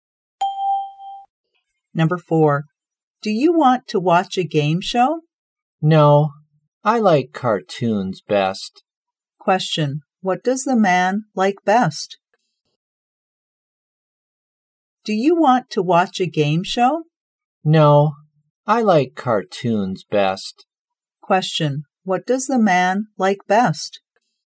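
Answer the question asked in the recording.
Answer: Cartoons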